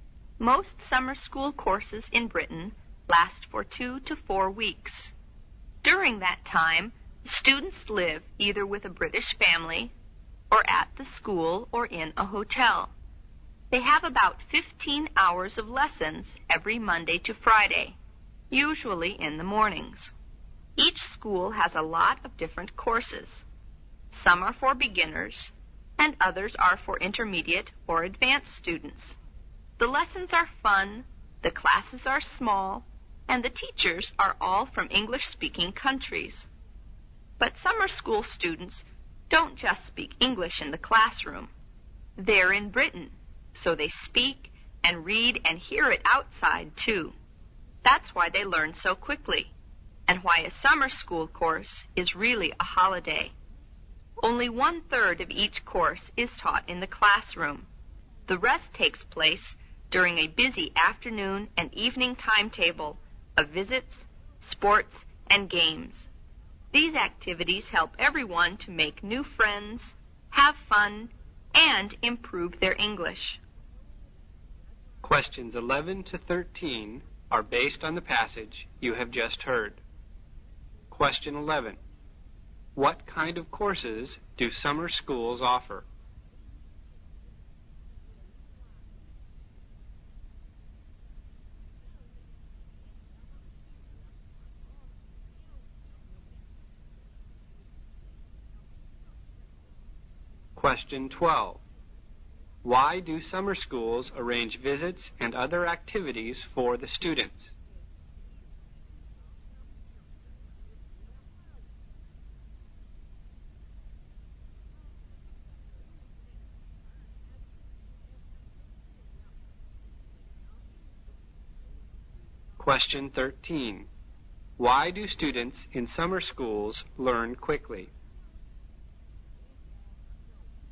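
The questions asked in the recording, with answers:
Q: What kind of courses do summer schools offer?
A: Courses for beginners, intermediate and advanced students

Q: Why do summer schools arrange visits and other activities for the students?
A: To help them make friends, have fun and improve their English

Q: Why do students in summer schools learn quickly?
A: They speak, read and hear English outside the classroom too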